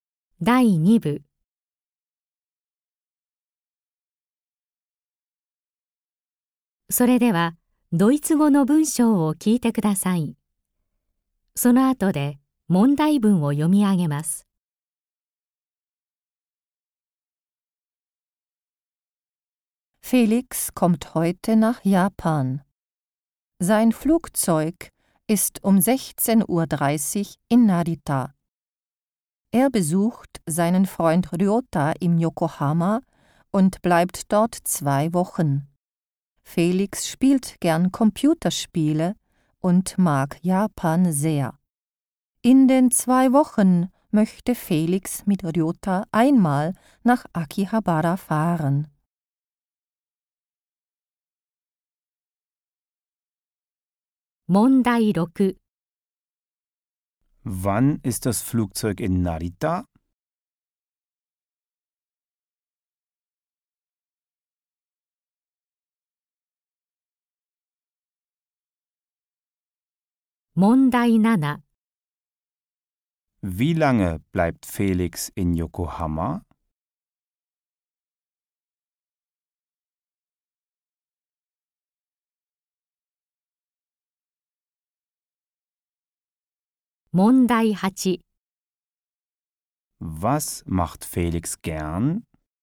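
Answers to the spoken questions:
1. Um 16.30 Uhr
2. 2 Wochen
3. Computerspiele spielen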